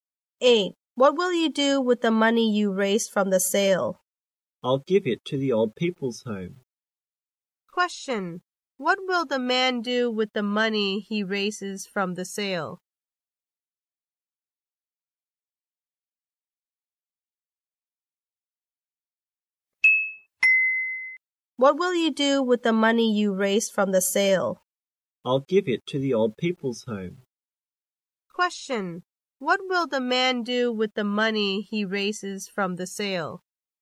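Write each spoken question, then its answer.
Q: What will the man do with the money he raises from the sale?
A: Give it to the old people's home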